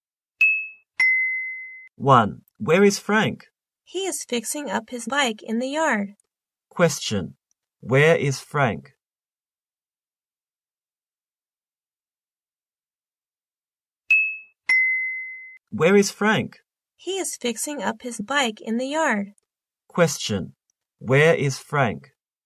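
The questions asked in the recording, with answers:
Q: where is Frank?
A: In the yard, fixing up his bike.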